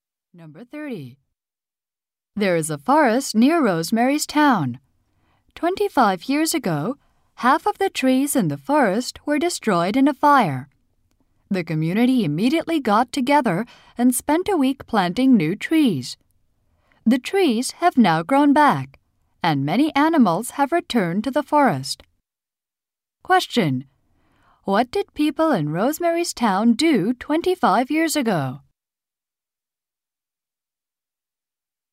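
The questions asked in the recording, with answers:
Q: What did people in Rosemary's Town do 25 years ago?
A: They planted new trees after a forest fire.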